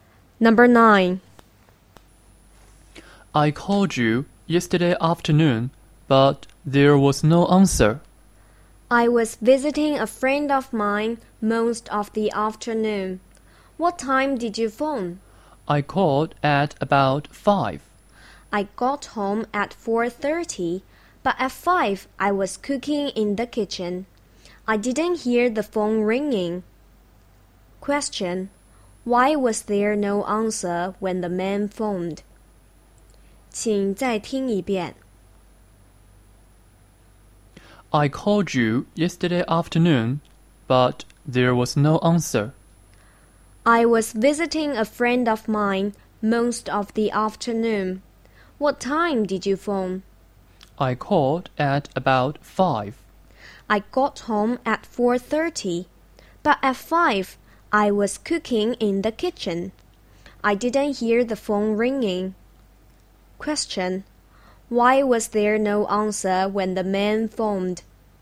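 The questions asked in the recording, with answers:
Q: Why was there no answer when the man phoned?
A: The woman was cooking in the kitchen and didn't hear the phone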